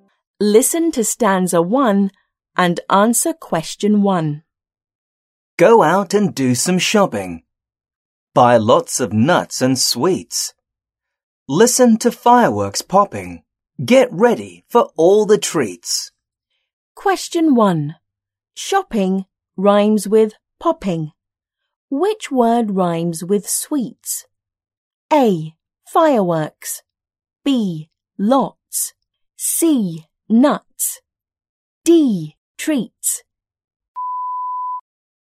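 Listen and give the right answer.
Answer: D: Treats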